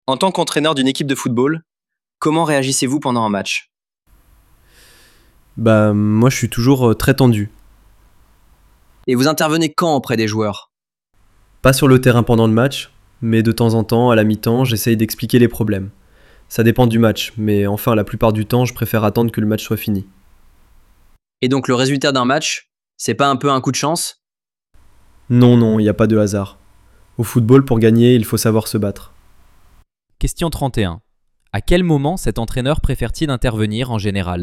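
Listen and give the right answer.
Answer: Après la fin du match.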